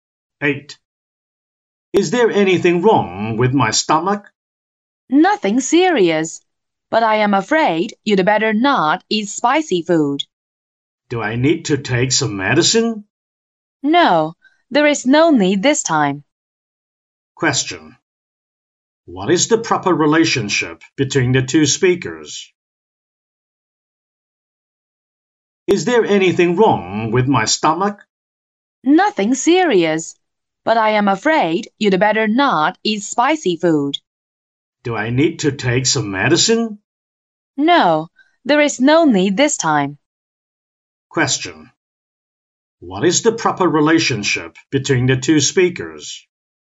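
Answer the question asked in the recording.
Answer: Doctor and patient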